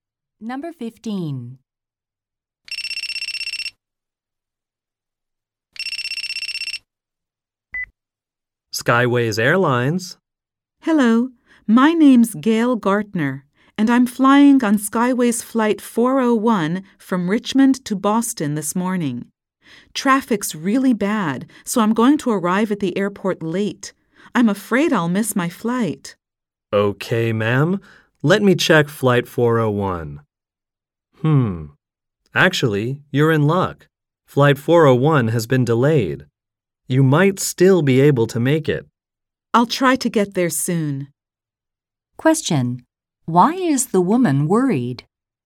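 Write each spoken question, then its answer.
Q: Why is the woman worried?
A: She may miss her flight because of traffic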